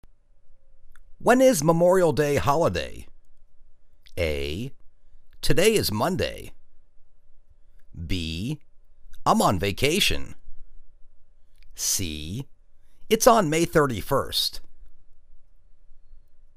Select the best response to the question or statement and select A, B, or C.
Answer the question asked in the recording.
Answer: It's on May 31st.